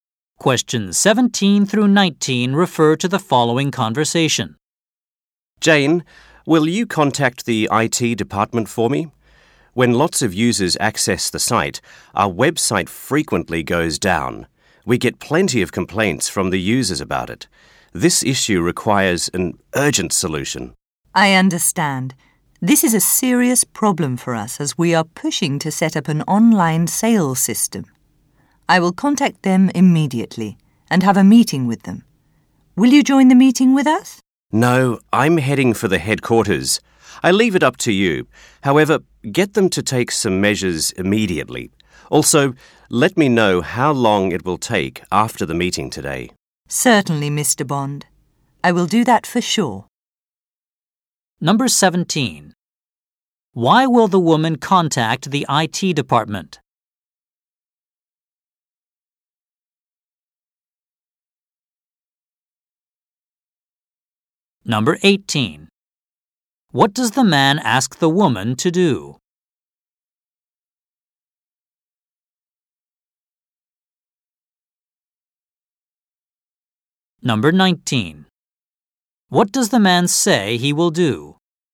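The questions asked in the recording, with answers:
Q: Why will the woman contact the IT department?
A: The website often goes down when many users access it

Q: What does the man ask the woman to do?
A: Have IT take measures right away and tell him how long it will take

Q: What does the man say he will do?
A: Go to the headquarters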